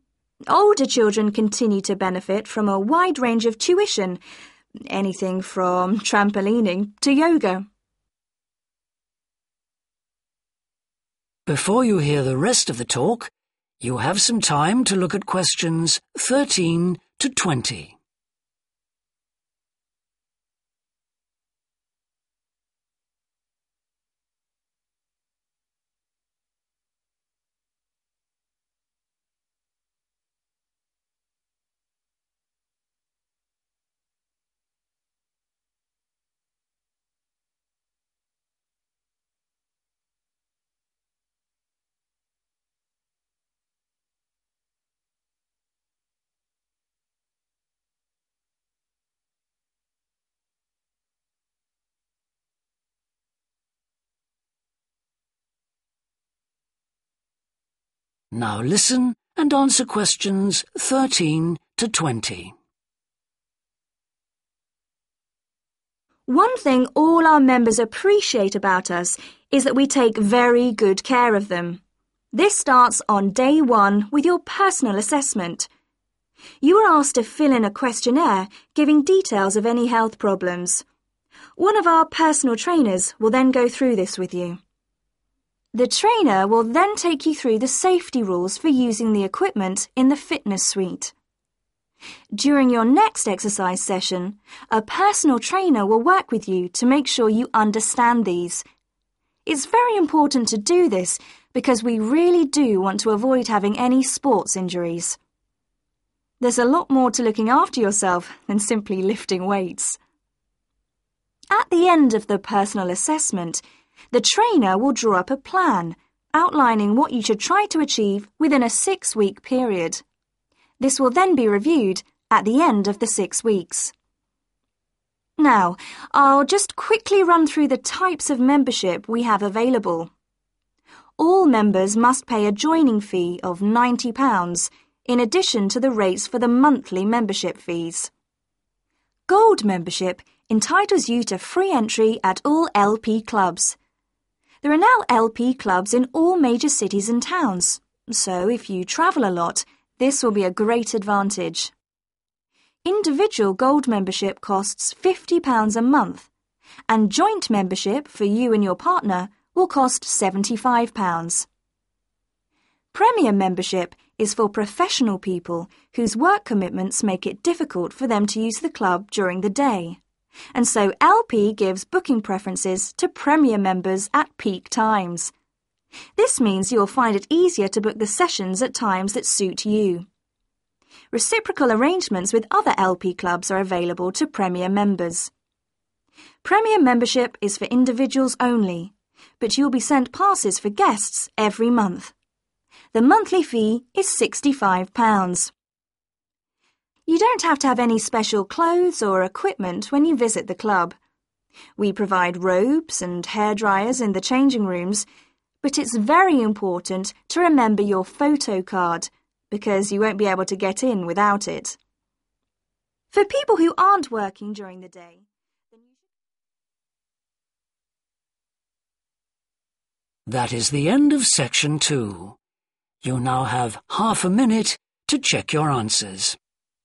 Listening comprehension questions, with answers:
Complete the notes below. Write NO MORE THAN TWO WORDS for each answer.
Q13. New members should describe any 13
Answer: health problems

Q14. will be explained to you before you use the equipment.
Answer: safety rules

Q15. You will be given a six-week 15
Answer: plan

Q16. There is a compulsory £90 16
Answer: joining

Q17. Gold members are given 17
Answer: free entry

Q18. Premier members are given priority during 18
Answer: peak

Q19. Premier members can bring some 19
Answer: guests

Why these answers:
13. giving details (= describe) of any health problems (cung cấp thông tin chi tiết về bất kì vấn đề sức khỏe nào)
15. the trainer will draw up a plan, outlining what you should try to achieve within a six-week period (người huấn luyện sẽ lập một kế hoạch, vạch ra những gì bạn nên cố gắng đạt được trong khoảng thời gian sáu tuần)
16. All members must pay a joining fee of £90 (Tất cả các thành viên phải trả phí gia nhập £90)
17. Gold membership entitles you to free entry at all LP Clubs (Thẻ thành viên Vàng cho phép bạn vào cửa miễn phí tại tất cả các Câu lạc bộ LP)
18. LP gives booking preferences (= given priority) to Premier members at peak times (LP ưu tiên việc đặt phòng cho các thành viên Premier vào lúc cao điểm)
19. you will be sent passes (= bring) for guests every month (bạn có thể dẫn một vài khách khác đến câu lạc bộ vào mỗi tháng)

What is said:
One thing all our members appreciate about us is that we take very good care of them. This starts on day one with your personal assessment. One of our personal trainers will then go through this with you.
The trainer will then (Q14) take you through (= explained to you) the safety rules (giải thích cho bạn các quy định về an toàn) for using the equipment in the fitness suite. During your next exercise session a personal trainer will work with you to make sure you understand these. It's very important to do this because we really do want to avoid having any sports injuries. There's a lot more to looking after yourself than simply lifting weights!
This will then be reviewed at the end of the six weeks.
Now, I'll just quickly run through the types of membership we have available. (Q16) All members must pay a joining fee of £90 (Tất cả các thành viên phải trả phí gia nhập £90) in addition to the rates for the monthly membership fees. There are now LP clubs in all major cities and towns so if you travel a lot will be a great advantage. Individual gold membership costs £50 a month and joint membership for you and your partner will cost £75.
Premier membership is for professional people whose work commitments make it difficult for them to use the club during the day and so (Q18) LP gives booking preferences (= given priority) to Premier members at peak times (LP ưu tiên việc đặt phòng cho các thành viên Premier vào lúc cao điểm). This means you will find it easier to book the sessions at times that suit you. Reciprocal arrangements with other LP Clubs are available to Premier members. The monthly fee is £65.
You don't have to have any special clothes or equipment when you visit the club. We provide robes and hairdryers in the changing rooms, but (Q20) it's very important to remember (= take with them) your photo card (cần nhớ mang theo ảnh thẻ) because you won't be able to get in without it.
For people who aren't working during the day then ...